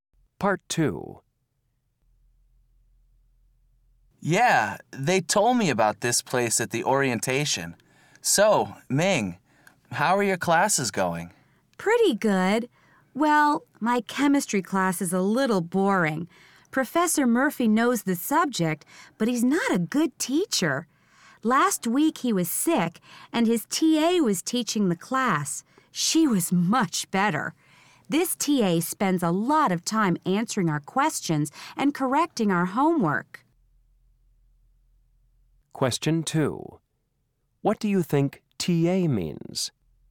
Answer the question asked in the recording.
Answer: Teaching assistants aren't common in Japanese universities.